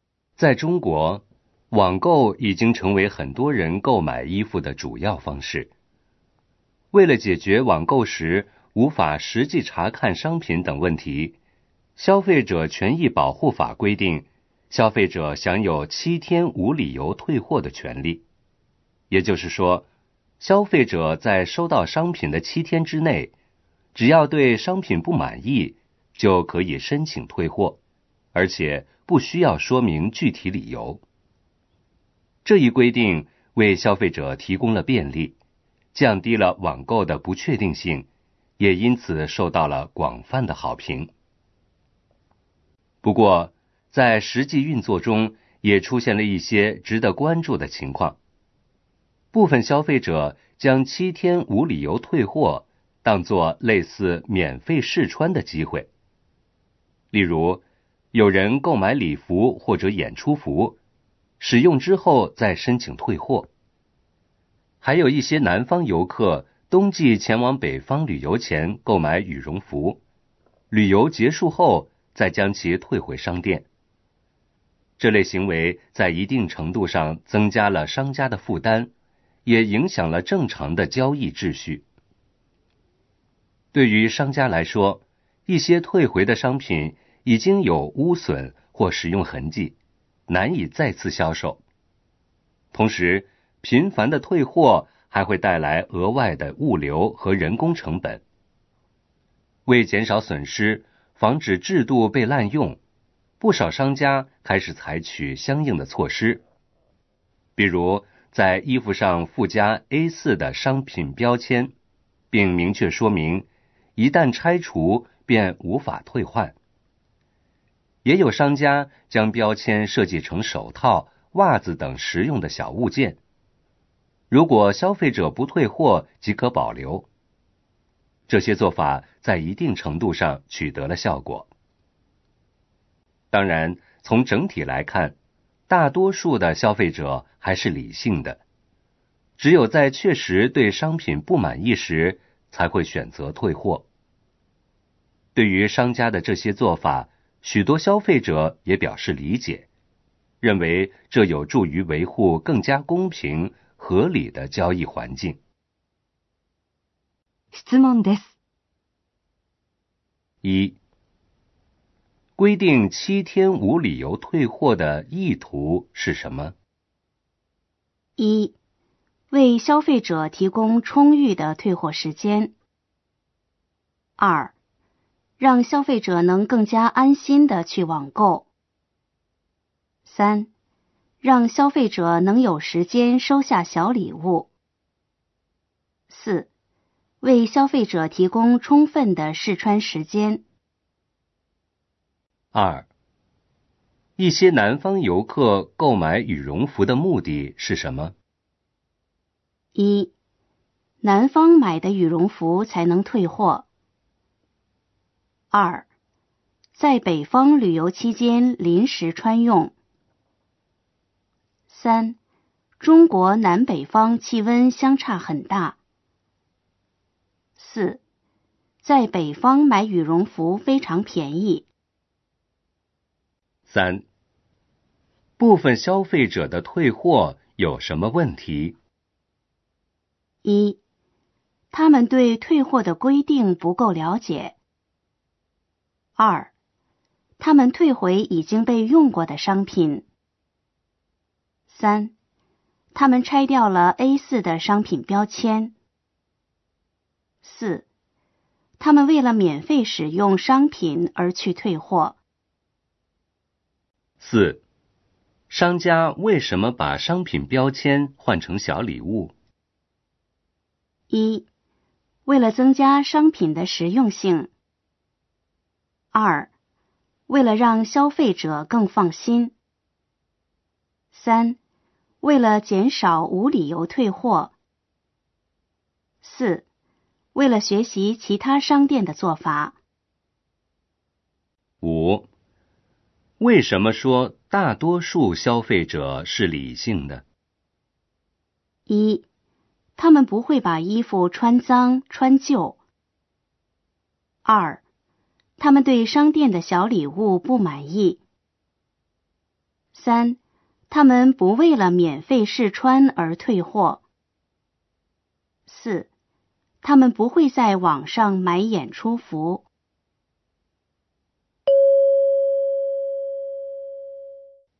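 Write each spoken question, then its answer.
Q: 规定七天无理由退货的意图是什么?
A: 2: 让消费者能更加安心地去网购。

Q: 一些南方游客购买羽绒服的目的是什么?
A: 2: 在北方旅游期间临时穿用。

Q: 商家为什么把商品标签换成小礼物?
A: 3: 为了减少无理由退货。

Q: 为什么说大多数消费者是理性的?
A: 3: 他们不为了免费试穿而退货。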